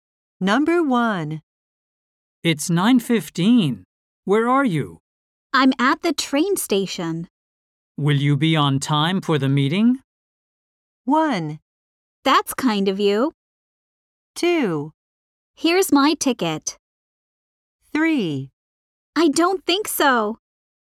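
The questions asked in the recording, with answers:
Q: Will you be on time for the meeting?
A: 3: I don't think so.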